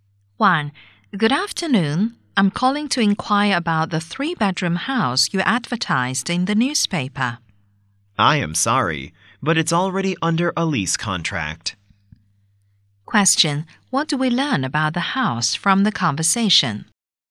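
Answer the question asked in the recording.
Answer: It has already been rented out.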